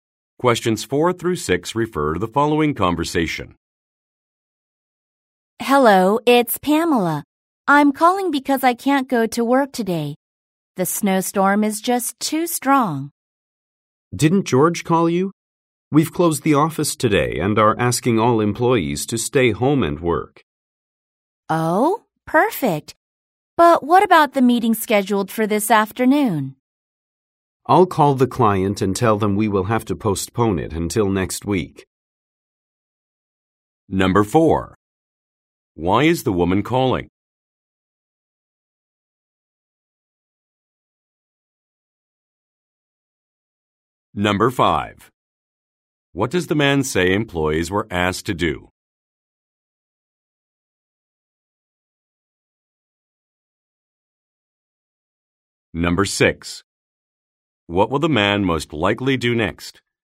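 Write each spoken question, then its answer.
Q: Why is the woman calling?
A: She can't go to work because of the snowstorm

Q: What does the man say employees were asked to do?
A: Stay home and work

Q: What will the man most likely do next?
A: Call the client to postpone the meeting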